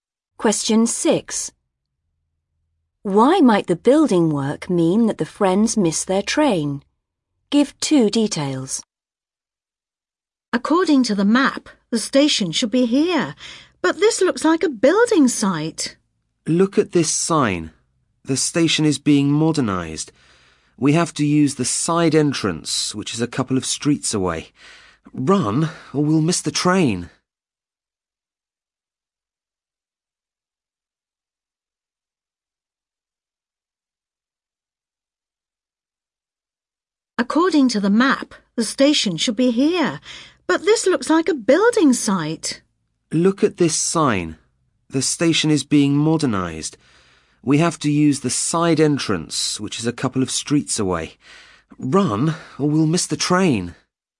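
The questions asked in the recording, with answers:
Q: Why might the building work mean that the friends miss their train?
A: The station is being modernised; they have to use the side entrance a couple of streets away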